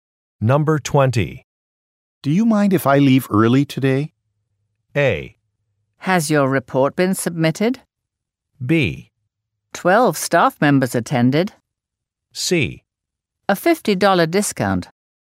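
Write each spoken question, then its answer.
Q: Do you mind if I leave early today?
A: A: Has your report been submitted?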